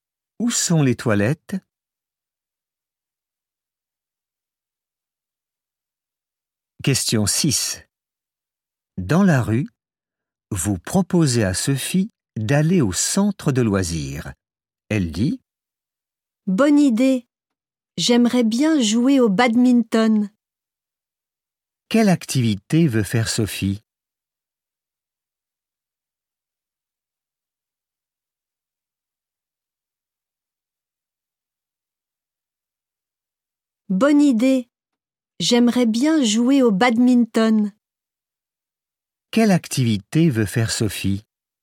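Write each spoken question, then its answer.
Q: Quelle activité veut faire Sophie ?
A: Jouer au badminton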